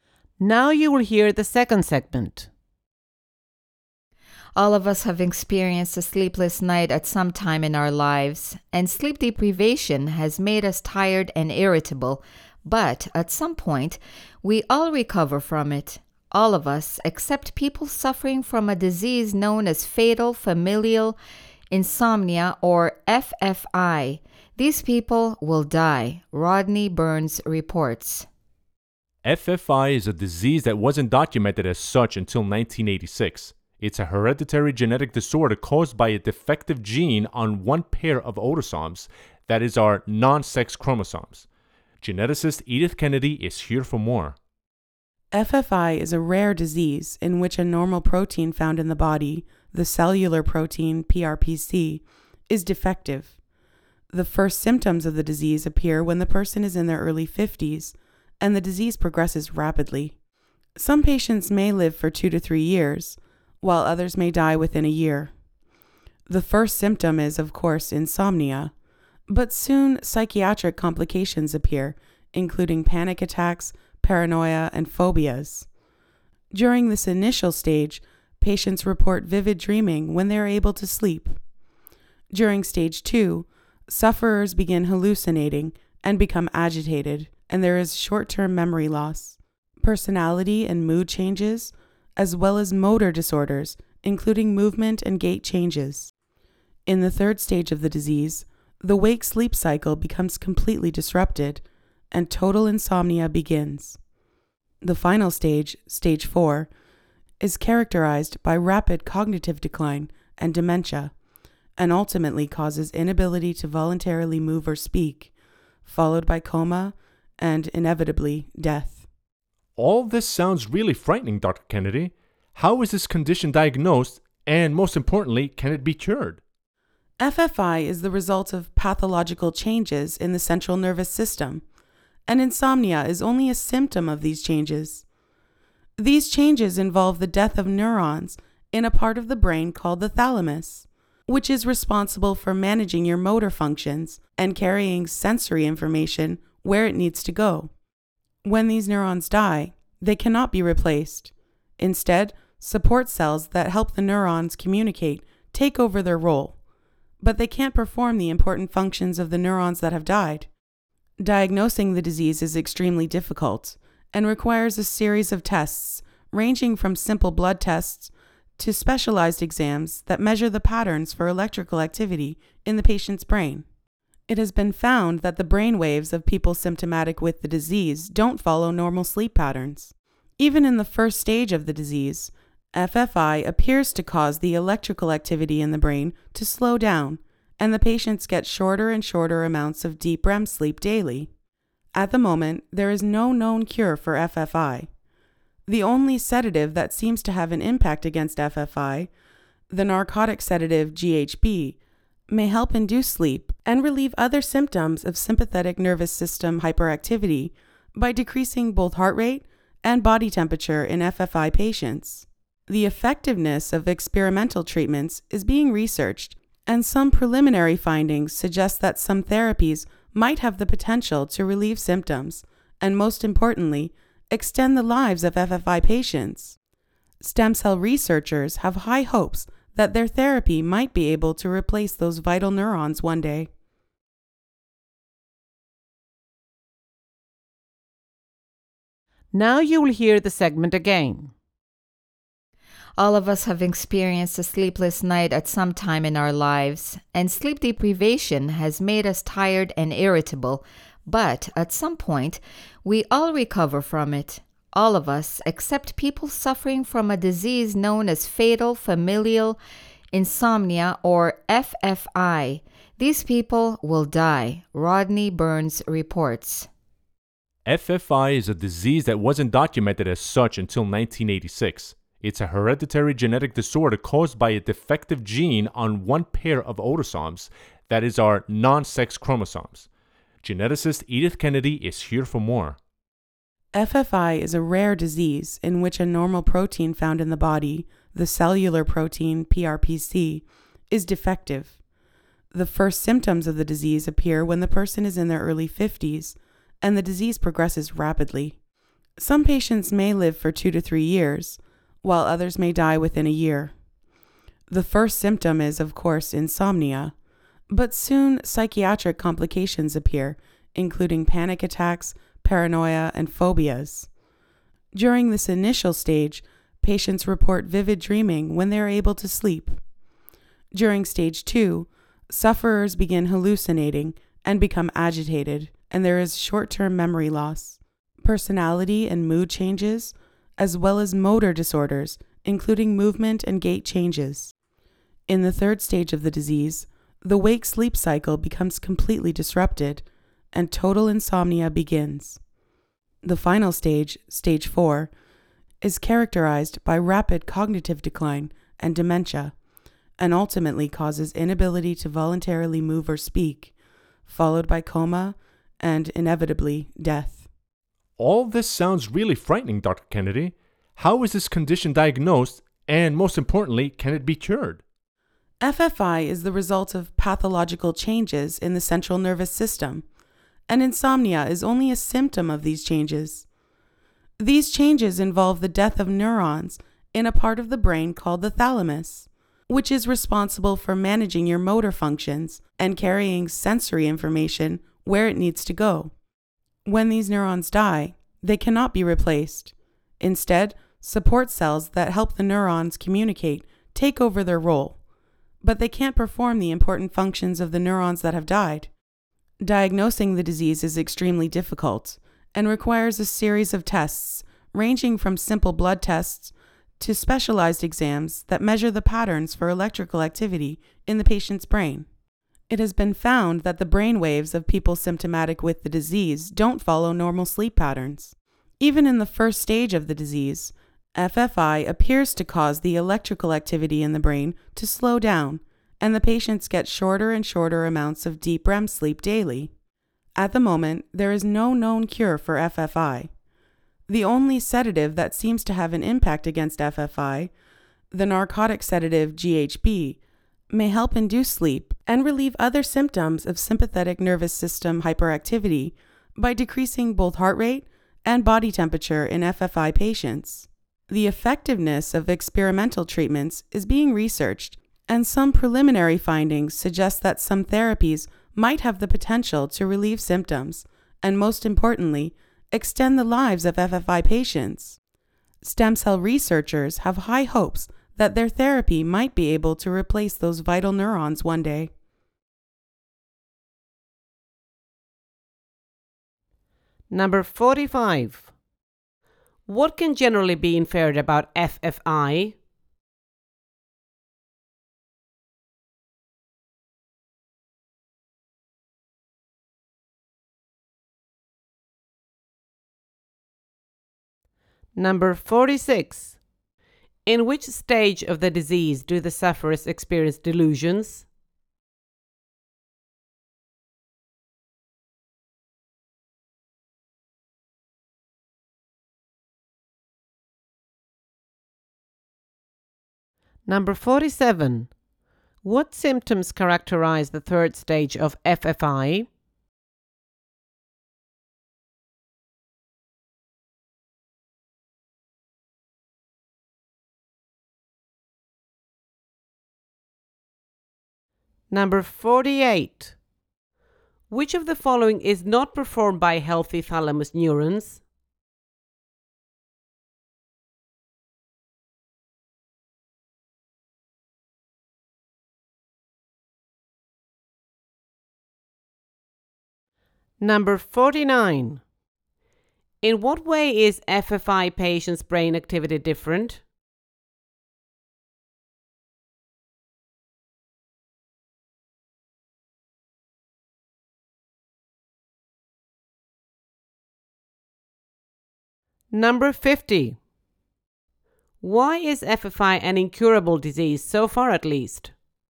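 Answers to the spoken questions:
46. Stage 2
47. The wake-sleep cycle is completely disrupted and total insomnia begins
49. It slows down and doesn't follow normal sleep patterns
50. The dead neurons in the thalamus cannot be replaced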